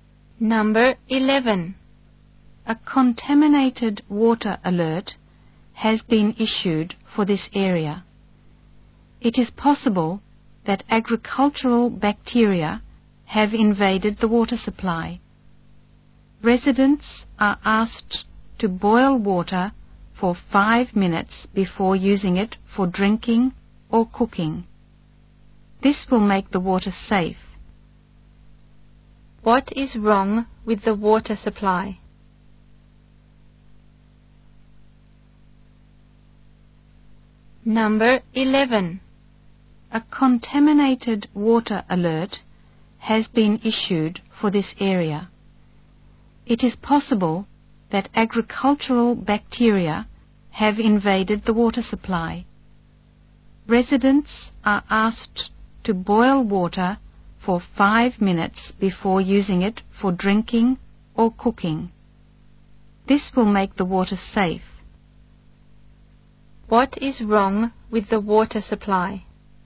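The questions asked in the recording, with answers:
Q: What is wrong with the water supply?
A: It may be contaminated with agricultural bacteria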